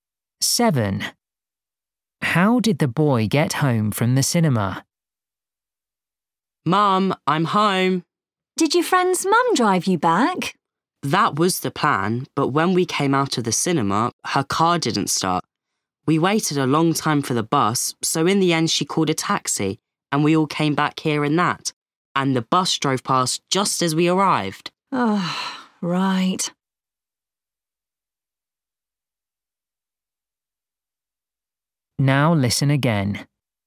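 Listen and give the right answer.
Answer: by taxi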